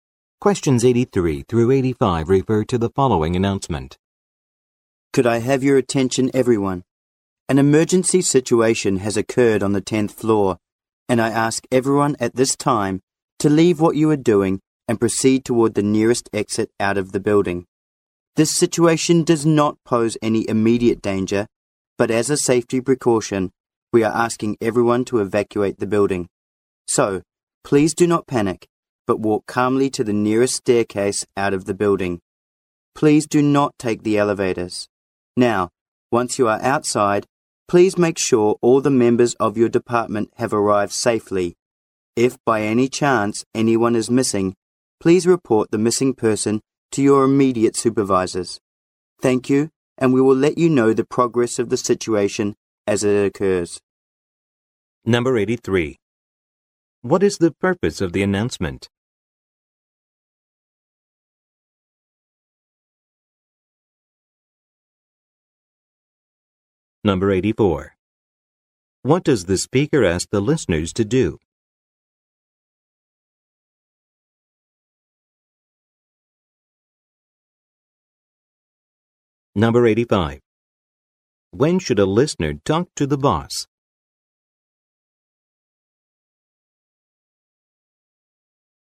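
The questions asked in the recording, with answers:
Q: What is the purpose of the announcement?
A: To have everyone leave the building because of an emergency

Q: What does the speaker ask the listeners to do?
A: Walk calmly to the nearest staircase and leave the building

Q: When should a listener talk to the boss?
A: If someone from their department is missing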